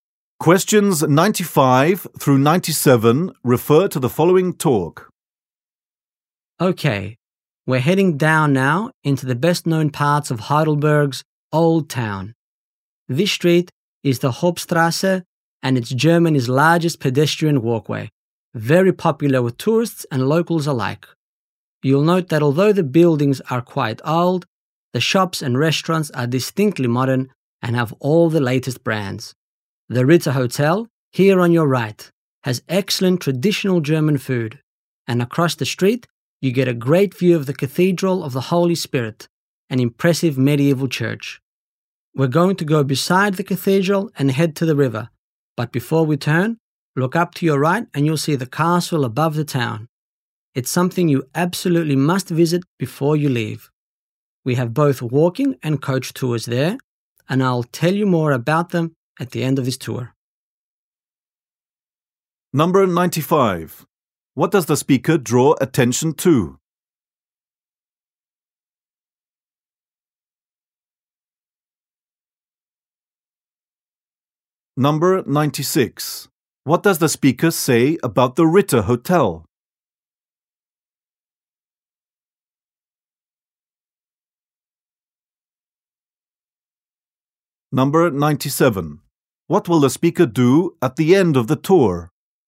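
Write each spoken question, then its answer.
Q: What does the speaker say about the Ritter Hotel?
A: It has excellent traditional German food

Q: What will the speaker do at the end of the tour?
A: Give more information about tours to the castle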